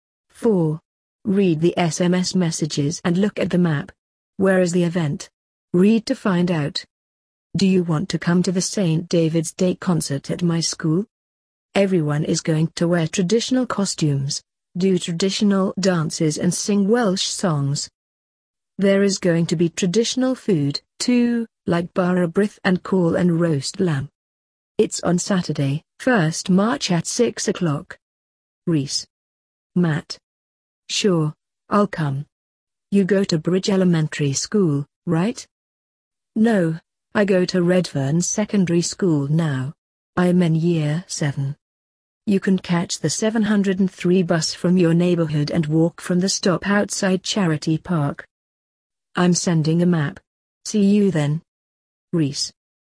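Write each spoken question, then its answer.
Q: Where is the event?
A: At Redfern Secondary School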